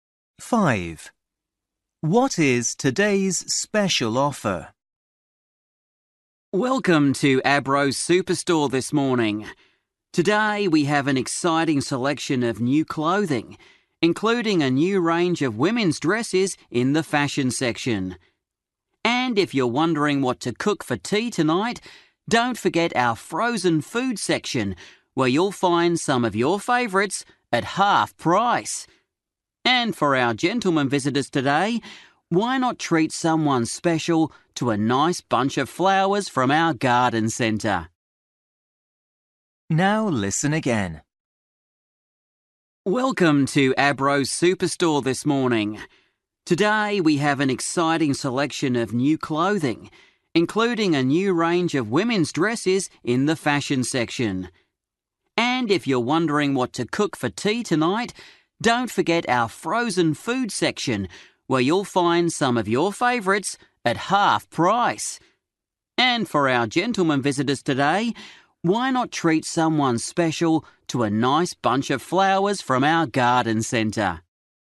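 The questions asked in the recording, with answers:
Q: What is today's special offer?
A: Half-price frozen food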